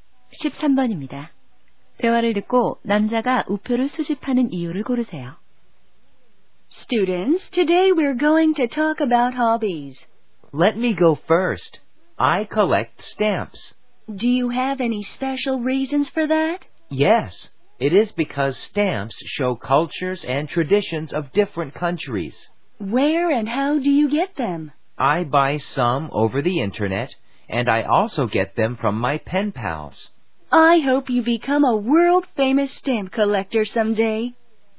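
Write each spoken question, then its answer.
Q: 대화를 듣고 남자가 우표를 수집하는 이유를 고르세요.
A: 우표가 여러 나라의 문화와 전통을 보여 주기 때문에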